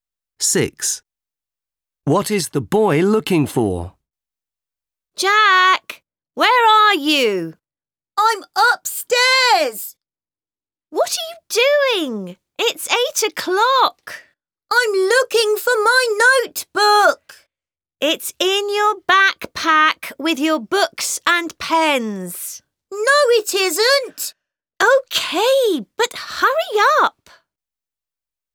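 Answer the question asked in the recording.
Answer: His notebook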